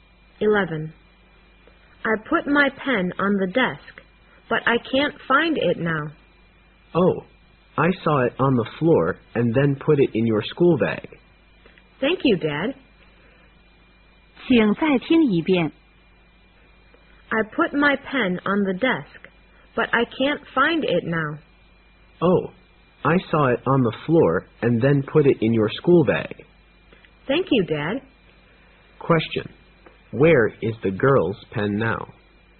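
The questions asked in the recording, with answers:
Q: Where is the girl's pen now?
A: In her school bag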